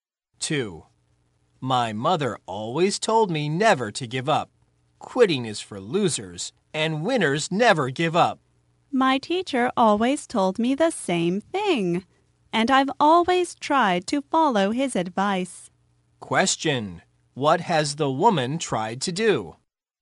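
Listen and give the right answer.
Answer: Follow her teacher's advice never to give up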